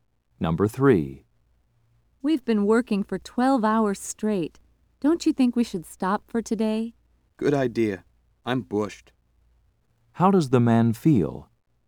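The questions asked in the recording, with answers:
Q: How does the man feel?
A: Very tired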